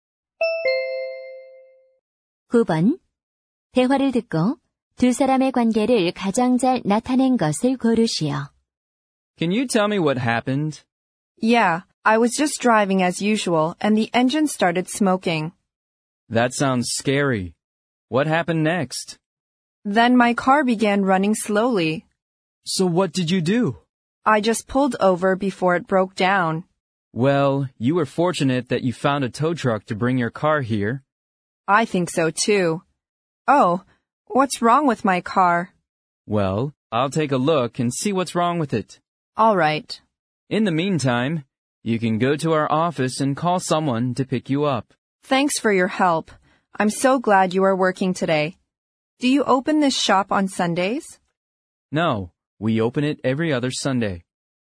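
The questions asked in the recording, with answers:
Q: 대화를 듣고 두 사람의 관계를 가장 잘 나타낸 것을 고르시오.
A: 자동차 정비사 - 고객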